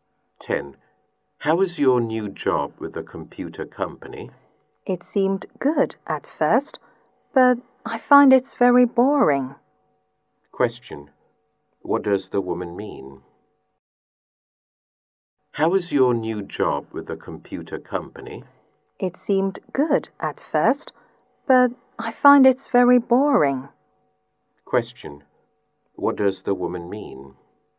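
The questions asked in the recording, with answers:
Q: Question. What does the woman mean?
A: Her new job is boring.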